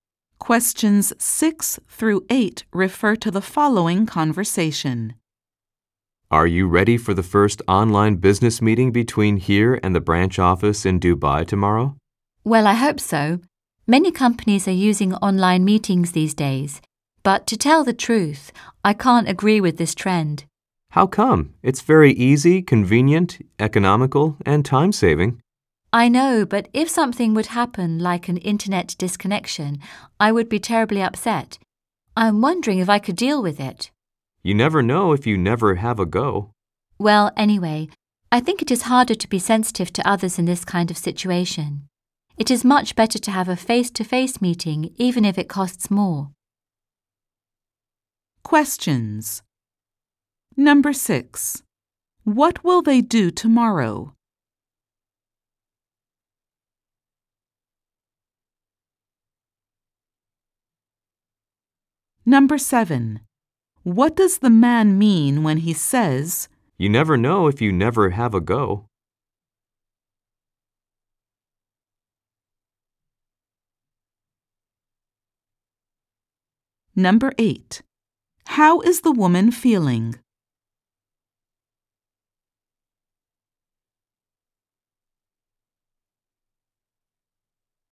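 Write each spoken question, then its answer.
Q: What will they do tomorrow?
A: Hold their first online business meeting with the branch office in Dubai

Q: What does the man mean when he says, "You never know if you never have a go"?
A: She should try it before judging; she won't know until she tries

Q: How is the woman feeling?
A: Worried and doubtful about the online meeting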